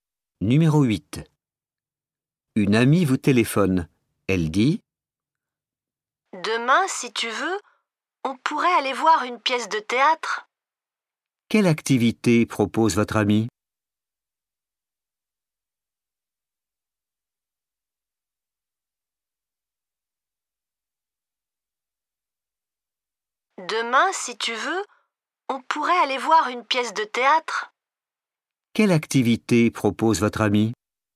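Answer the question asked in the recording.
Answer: aller voir une pièce de théâtre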